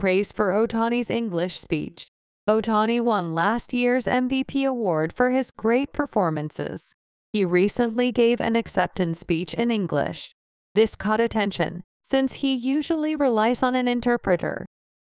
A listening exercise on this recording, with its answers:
英語ニュースの音声を聞き、各空欄に入る英文を正確に書き取ってください。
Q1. Ohtani won last year's MVP ( ).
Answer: award for his great performances

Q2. He recently ( ).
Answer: gave an acceptance speech in English

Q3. This ( ) an interpreter.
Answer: caught attention since he usually relies on

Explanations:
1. ▶ MVP award(最優秀選手賞):MVP」は「(the) Most Valuable Player(最優秀選手)」の頭文字を取った略語です。野球やサッカーなどスポーツでよく使われます。 今回の答案では「award」の書き忘れと綴りミスがありました。リスニング動画の中に英文を和訳を入れていますから、予習した上でケアレスミスのチェックをすれば間違いを防げます。
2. ▶ an acceptance speech(受賞スピーチ):「acceptance speech」もリスニング動画に登場しているため、ほとんどの人が書き取れていました。ここを間違えた人は動画を再度ご確認ください。 ここでの冠詞は「an」ですが、文法的には「his」が入る可能性もあります。「an」になっている理由は、直前の英文で「his」を使用しており、重複を避けるためです。
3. ▶ This caught attention(このことは関心を呼んだ) :ここでの「attention」は一般的な注目や関心を指すため、不可算名詞として使用するのが自然です。 発音されていない「an」を「可算名詞だから」という文法解釈で付け加えた不正解答案が幾つかありました。 「特定の注意」を表す場合は、「This caught the attention of many.」のように具体的な説明を加えて定冠詞を付けます。 また、「catch」の過去形「caught」を聞き取れなかった人は、この単語の発音に注意してください。カタカナで「コート」のイメージを勝手に持っていませんか? アメリカ英語の「caught」は「カーッ」のような響きで、日本人が思っているより「カ」に近く意外と短い音です。 発音をもう一度チェック!)This caught attention. ▶ he usually relies on an interpreter(彼は通常、通訳に頼る): 「relies on」の箇所を「uses」と書いた人は、予習動画の表現をそのまま使ってしまいましたね。 動画を参考にするのは良いのですが、Quizで全く同じ動詞を使っているとは限りません。実際に聞こえた音にもっと注意する必要があります。

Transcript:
Ohtani won / last year's MVP award / for his great performances. / He recently gave / an acceptance speech / in English. / This caught attention / since he usually relies on / an interpreter.

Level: 英検2級・TOEIC550点以上の中級者